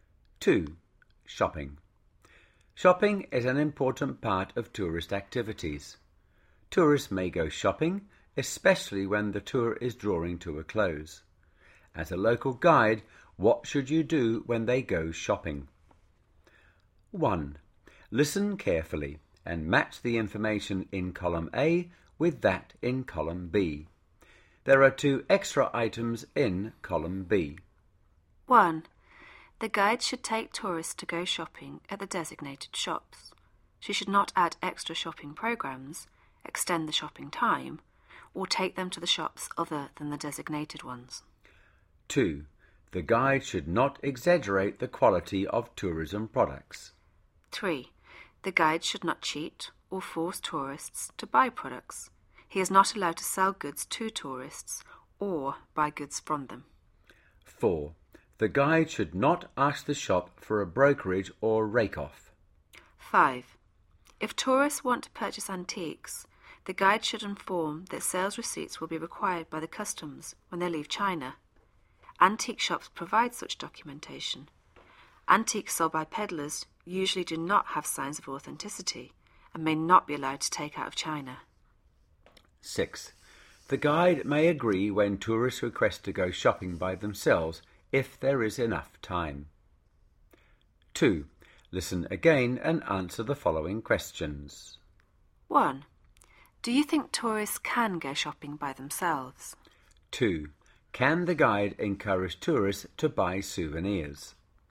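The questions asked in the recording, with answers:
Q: Do you think tourists can go shopping by themselves?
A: Yes, the guide may agree if there is enough time.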